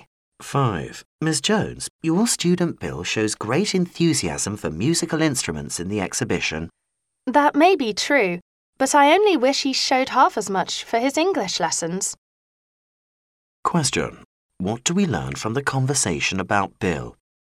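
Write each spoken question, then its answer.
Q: What do we learn from the conversation about Bill?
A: He is much less enthusiastic about his English lessons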